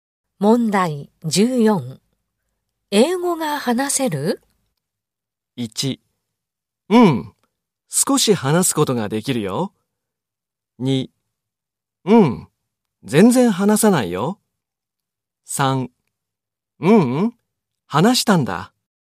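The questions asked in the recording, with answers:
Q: 英語が話せる?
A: 1: うん、少し話すことができるよ。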